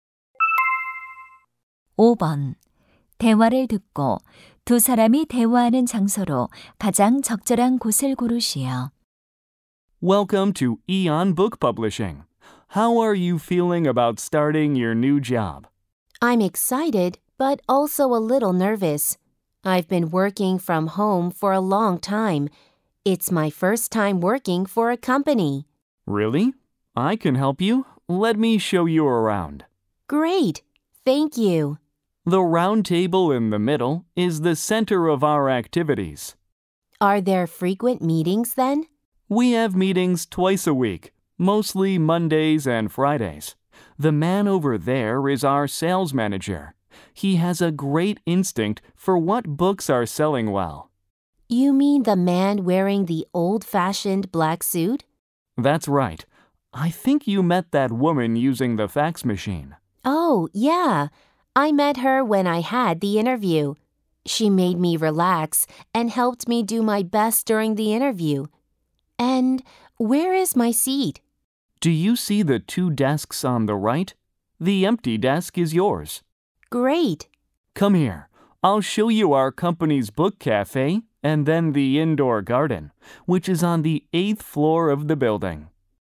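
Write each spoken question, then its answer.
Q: 대화를 듣고 두 사람이 대화하는 장소로 가장 적절한 곳을 고르시오.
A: 출판사 사무실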